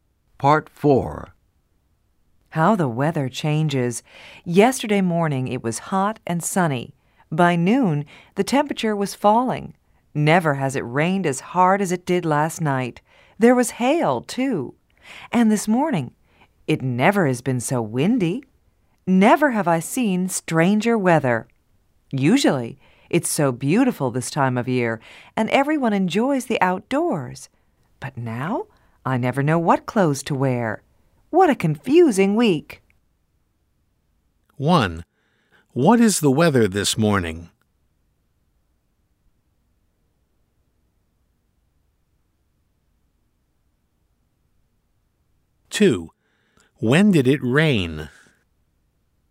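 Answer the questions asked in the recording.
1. Very windy
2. Last night
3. It is strange and confusing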